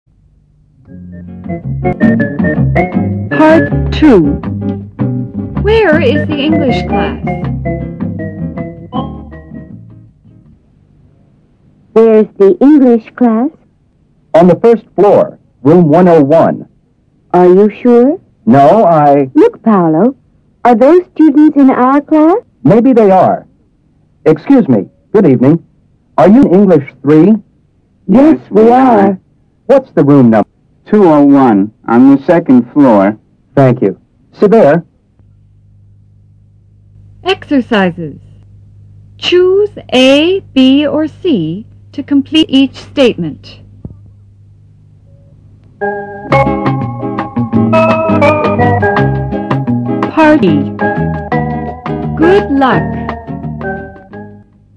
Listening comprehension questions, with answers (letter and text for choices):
Choose a ,b or c to complete each statement.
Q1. Paulo thinks the English class is ...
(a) on the second floor.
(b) on the first floor.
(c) on the third floor.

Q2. Paulo thinks the room number is ...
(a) 101.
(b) 201.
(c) 102.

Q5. The students are ... .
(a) in English 3.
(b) in English 13.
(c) in English 30.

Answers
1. (b) on the first floor.
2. (a) 101.
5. (a) in English 3.